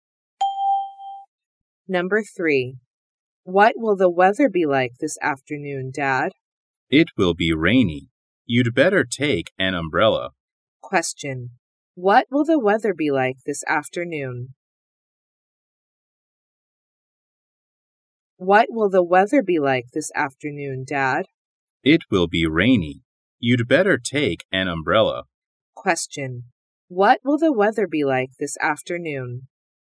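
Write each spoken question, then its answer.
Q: What will the weather be like this afternoon?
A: It will be rainy.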